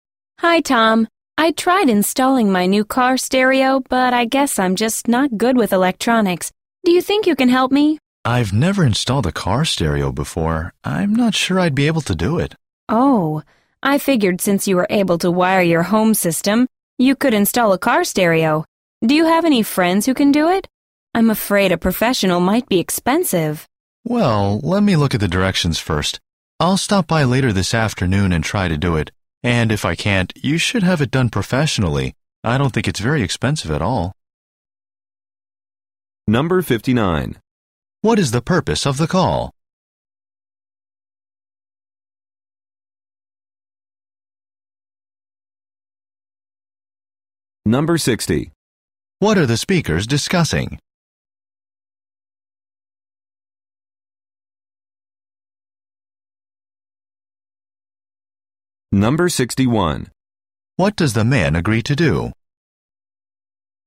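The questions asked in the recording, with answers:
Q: What is the purpose of the call?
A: To ask Tom for help installing her new car stereo

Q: What are the speakers discussing?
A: Installing a car stereo

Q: What does the man agree to do?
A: Read the directions, stop by later this afternoon and try to install it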